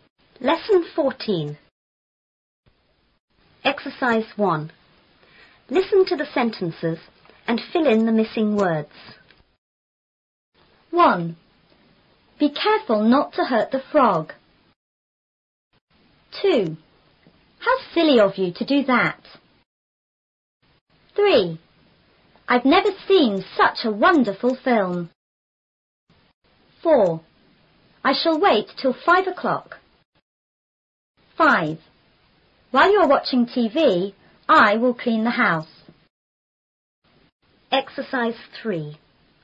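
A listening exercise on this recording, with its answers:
1.Listen to the sentences and fill in the missing words.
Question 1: Be___not to hurt the frog.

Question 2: How___of you to do that!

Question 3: I've never seen___a wonderful film.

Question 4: I shall wait___five o'clock.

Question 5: ___you are watching TV,I will clean the house.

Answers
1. careful
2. silly
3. such
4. till
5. While

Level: 初中英语广州版4B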